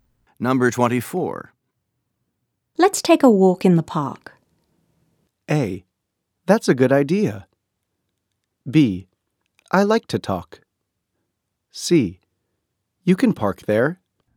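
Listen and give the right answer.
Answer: A: That's a good idea.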